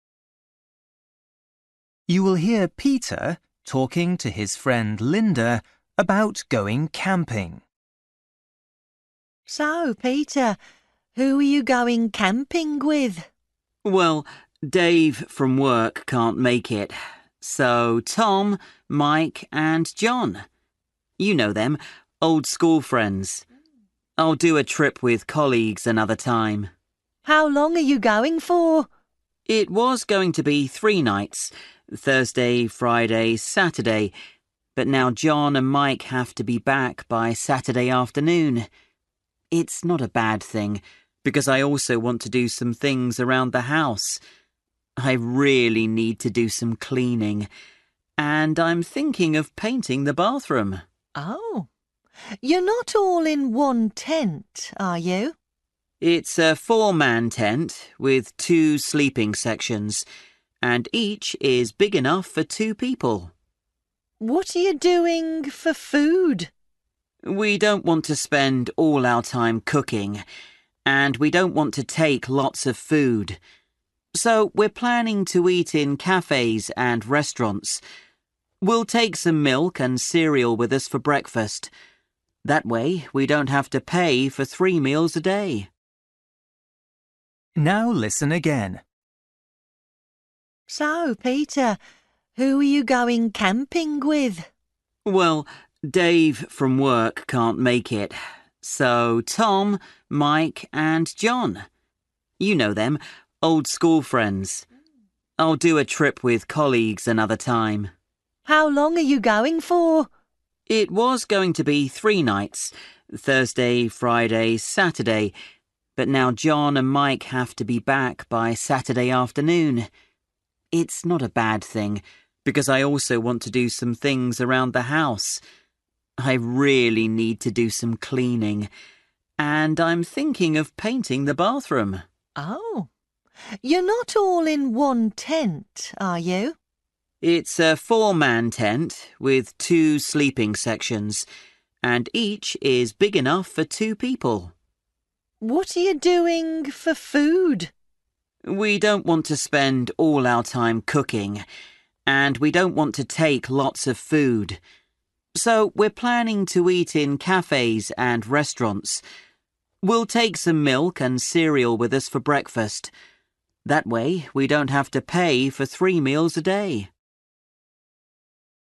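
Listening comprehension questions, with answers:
For each question, choose the correct answer.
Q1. Who is Peter going camping with?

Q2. How many nights are Peter and his friends going camping for?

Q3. Peter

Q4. How many tents are they taking?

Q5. Peter and his friends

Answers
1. old school friends (Tom, Mike and John)
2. two
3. wants to do some cleaning and paint the bathroom
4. one
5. will eat in cafes and restaurants

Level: Luyện nghe trình độ A2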